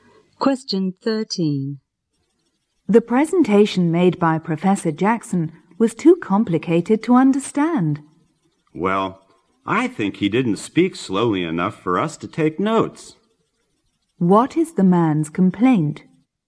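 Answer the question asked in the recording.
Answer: Professor Jackson spoke too fast to take notes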